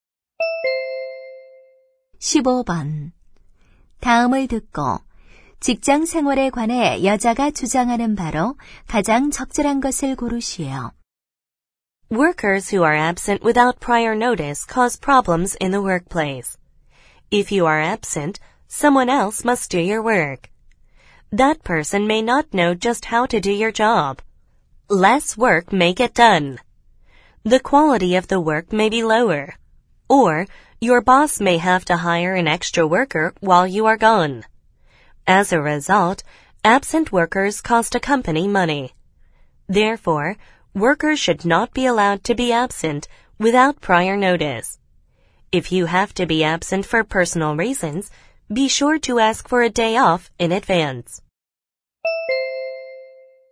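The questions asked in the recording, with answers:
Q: 다음을 듣고 직장 생활에 관해 여자가 주장하는 바로 가장 적절한 것을 고르시오.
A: 사전 통보 없이 결근해서는 안 된다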